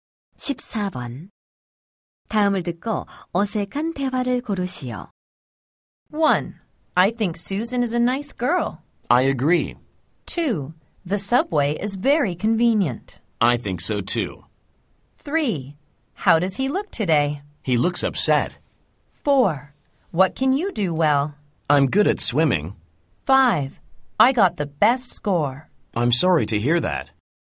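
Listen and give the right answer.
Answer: 5: I got the best score. / I'm sorry to hear that.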